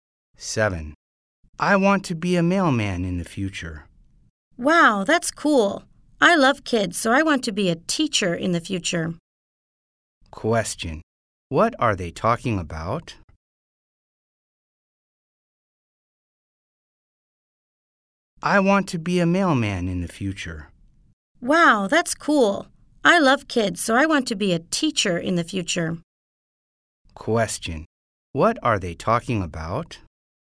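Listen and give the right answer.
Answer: Their future jobs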